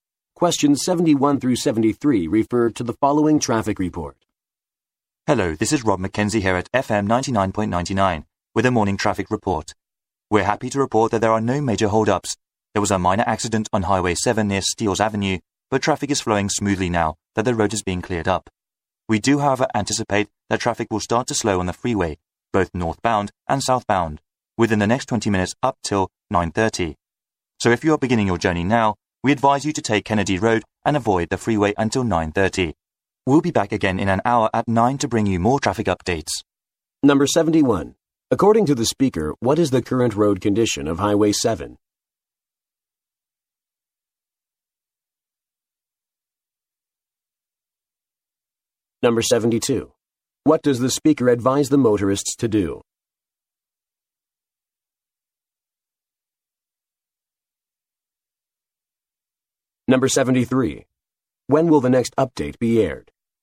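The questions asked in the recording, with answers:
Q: According to the speaker, what is the current road condition of Highway 7?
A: Traffic is flowing smoothly after a minor accident is cleared

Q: What does the speaker advise the motorists to do?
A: Take Kennedy Road and avoid the freeway until 9:30

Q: When will the next update be aired?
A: In an hour, at 9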